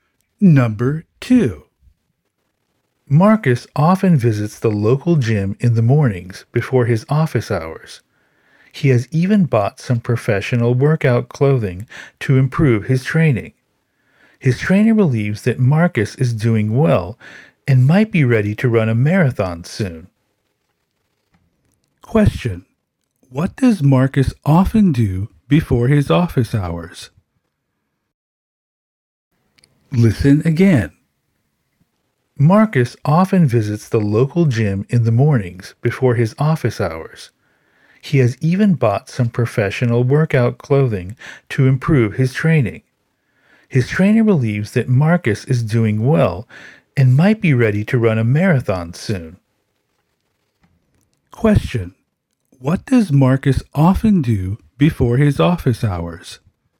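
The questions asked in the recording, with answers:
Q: What does Marcus often do before his office hours?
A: He visits the local gym.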